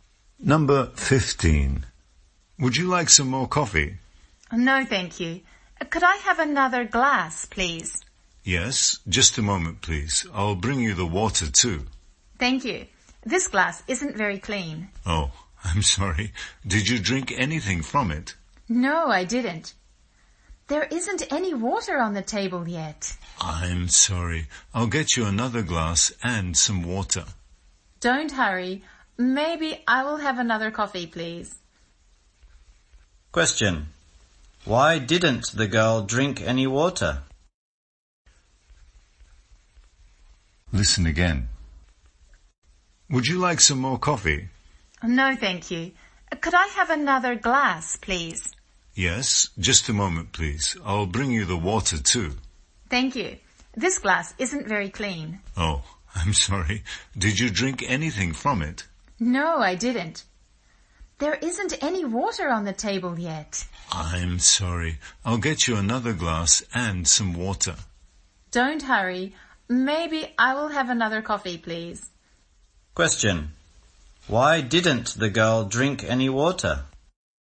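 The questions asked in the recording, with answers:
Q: Why didn't the girl drink any water?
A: There wasn't any water on the table yet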